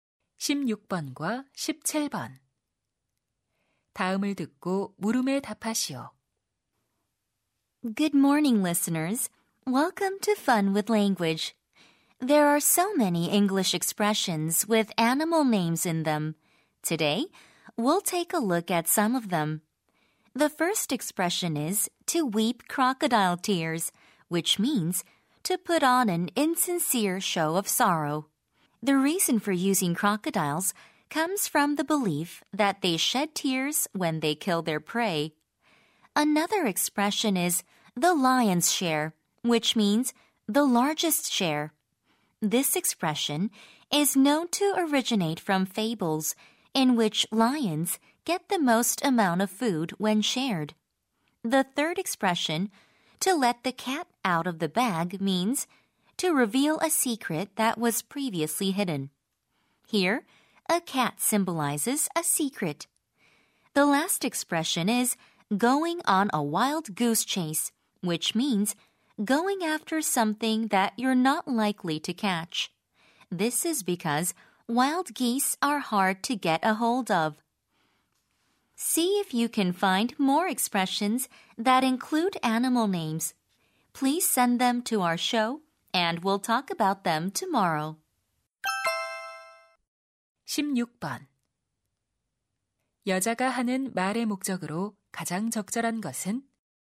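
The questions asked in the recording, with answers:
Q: 16번 여자가 하는 말의 목적으로 가장 적절한 것은?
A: 동물 이름이 들어간 영어 표현을 소개하려고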